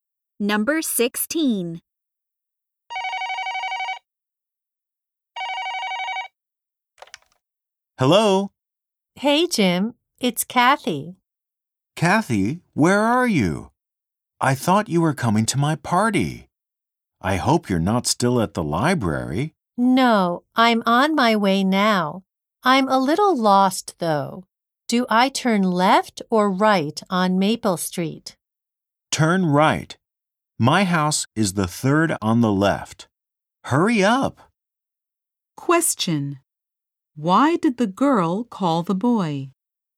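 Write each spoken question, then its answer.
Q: Why did the girl call the boy?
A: She is lost on the way to his house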